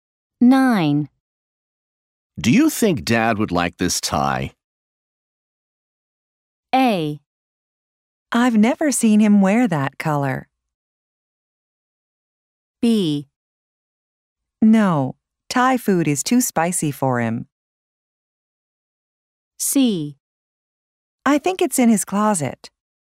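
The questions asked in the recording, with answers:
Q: Do you think Dad would like this tie?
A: A: I've never seen him wear that color.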